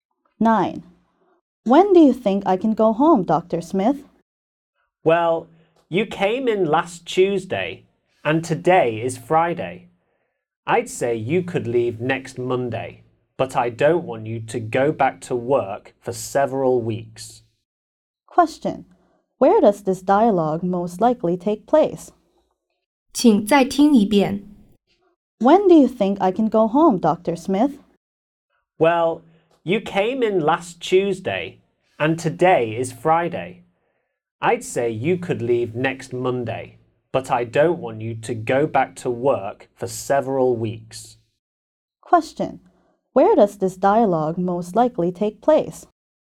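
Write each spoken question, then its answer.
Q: Where does this dialogue most likely take place?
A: In a hospital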